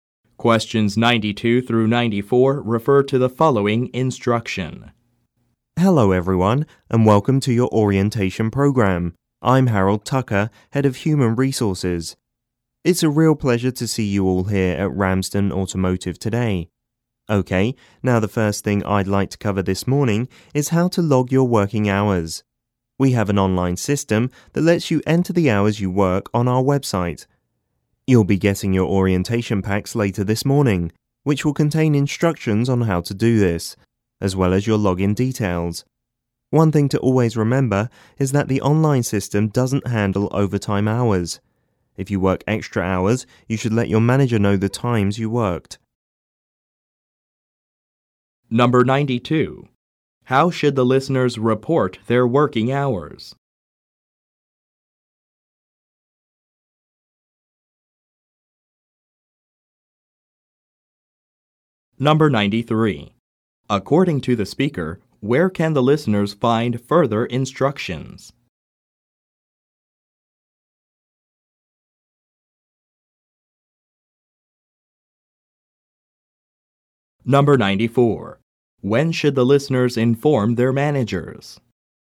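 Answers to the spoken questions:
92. Using an online system on the website
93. In their orientation packs
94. When they work overtime hours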